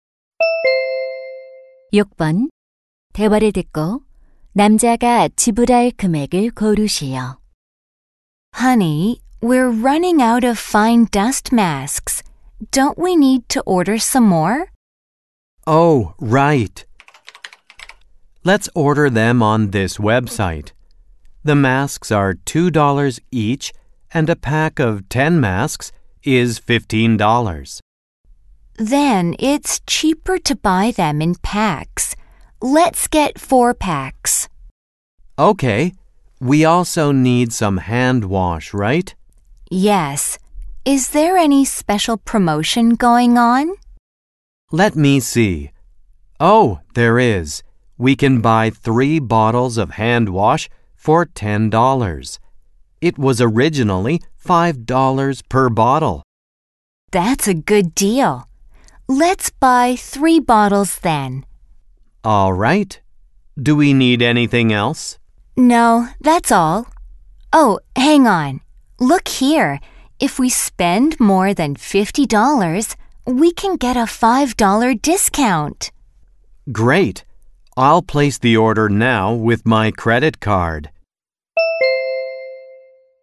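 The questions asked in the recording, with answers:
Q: 대화를 듣고 남자가 지불할 금액을 고르시오.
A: $65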